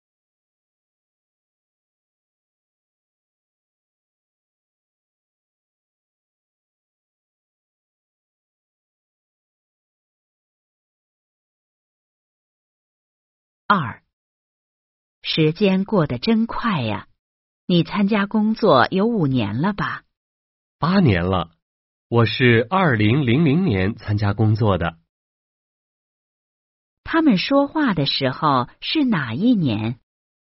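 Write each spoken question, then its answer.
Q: 他们说话的时候是哪一年?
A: 2008年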